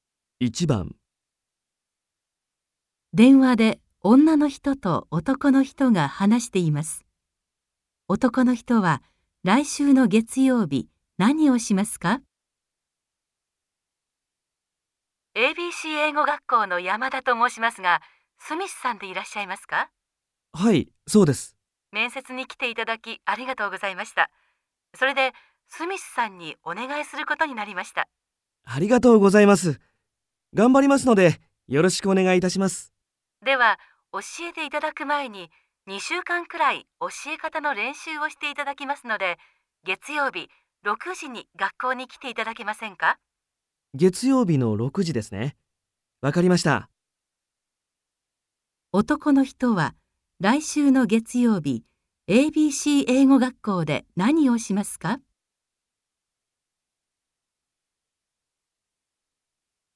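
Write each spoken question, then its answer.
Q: 男の人は、来週の月曜日、ABC 英語学校で何をしますか?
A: 教え方の練習をする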